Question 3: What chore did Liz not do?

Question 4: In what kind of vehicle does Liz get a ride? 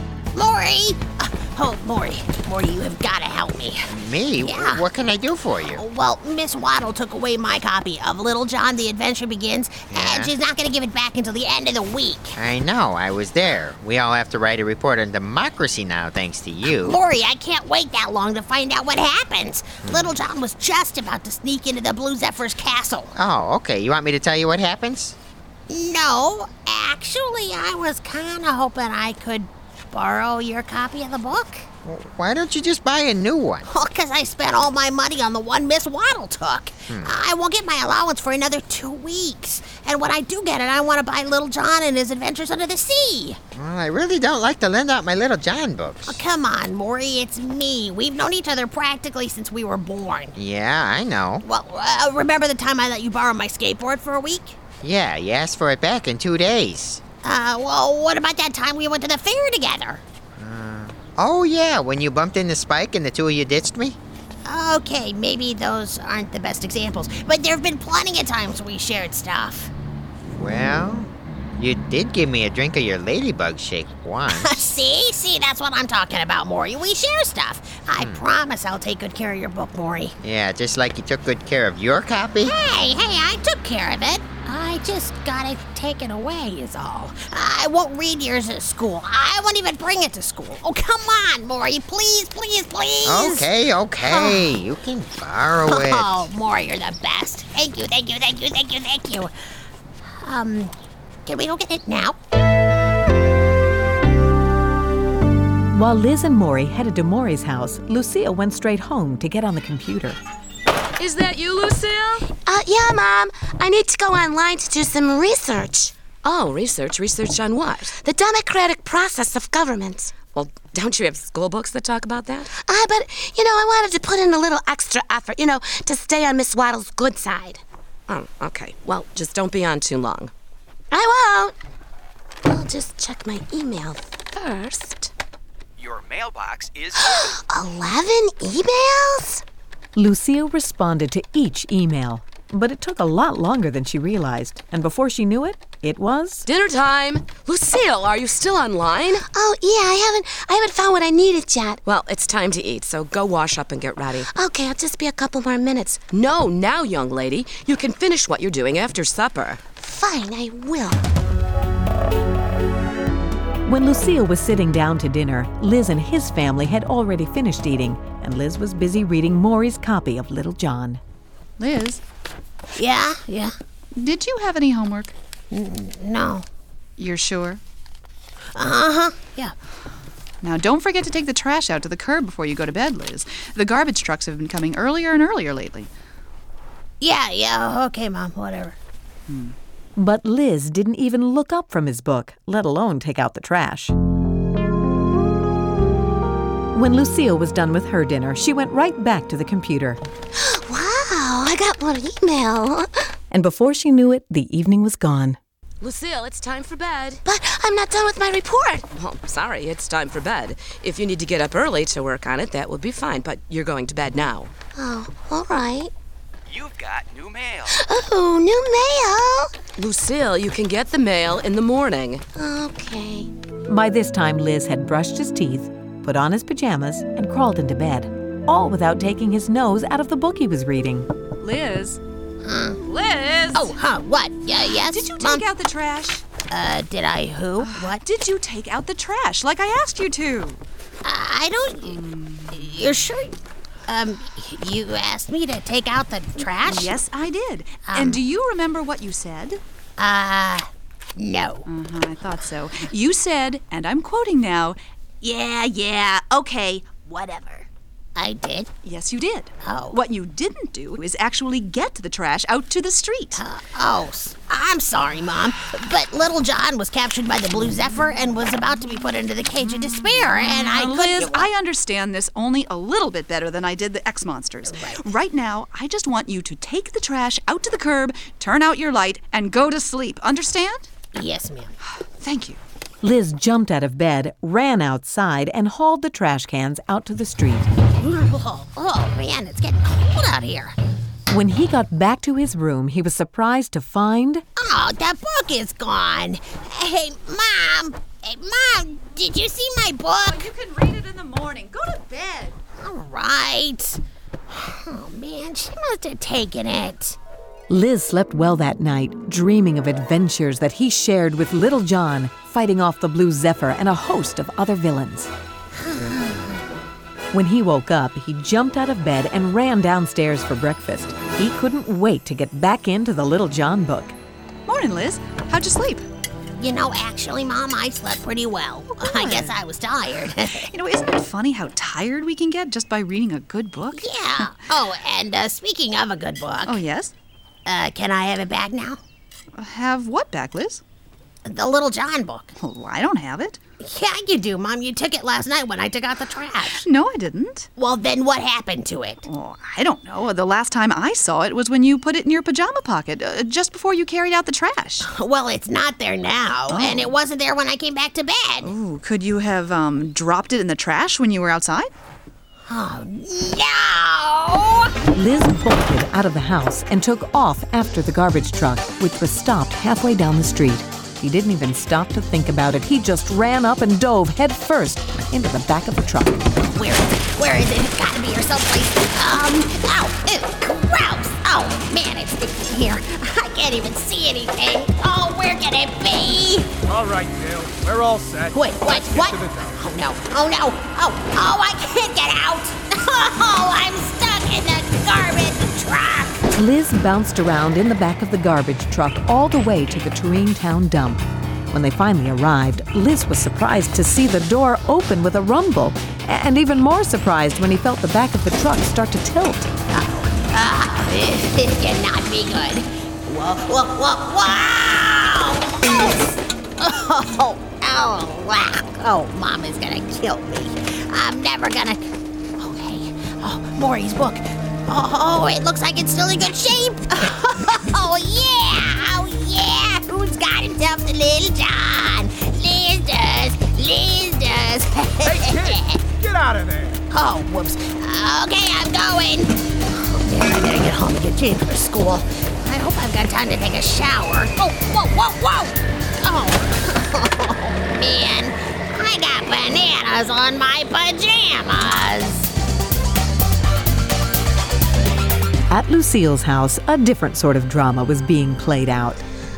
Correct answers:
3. He didn't take out the trash.
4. A garbage truck.